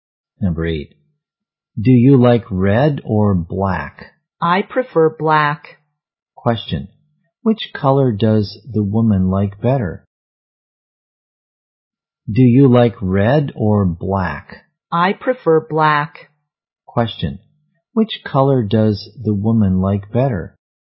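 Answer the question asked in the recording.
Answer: Black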